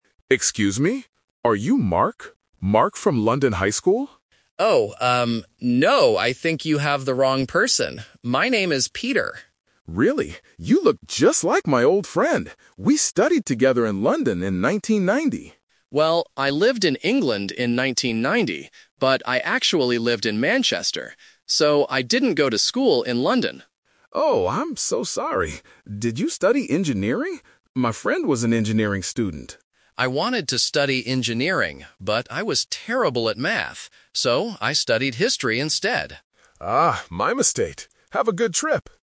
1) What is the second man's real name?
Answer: Peter.

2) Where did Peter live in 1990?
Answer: In Manchester.

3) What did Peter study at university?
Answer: History.

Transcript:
Man A: Excuse me. Are you Mark? Mark from London High School?
Man B: Oh, um, no. I think you have the wrong person. My name is Peter.
Man A: Really? You look just like my old friend. We studied together in London in 1990.
Man B: Well, I lived in England in 1990, but I actually lived in Manchester. So, I didn't go to school in London.
Man A: Oh, I'm so sorry. Did you study engineering? My friend was an engineering student.
Man B: I wanted to study engineering, but I was terrible at math. So, I studied history instead.